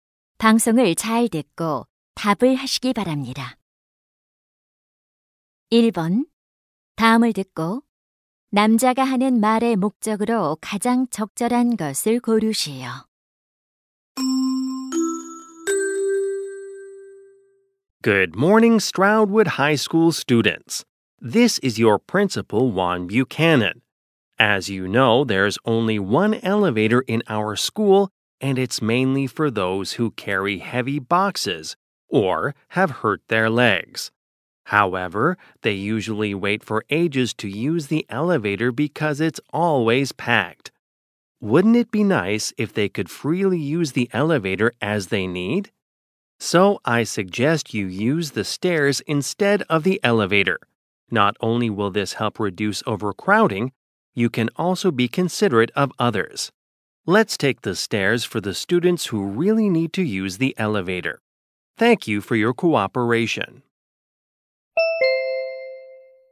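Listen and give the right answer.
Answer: 엘리베이터 대신 계단을 이용하도록 권장하려고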